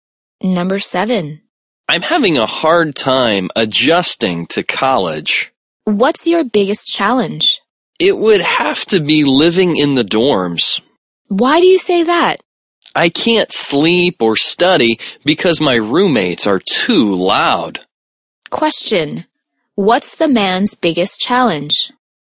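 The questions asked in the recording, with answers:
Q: What's the man's biggest challenge?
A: Living in the dorms; his roommates are too loud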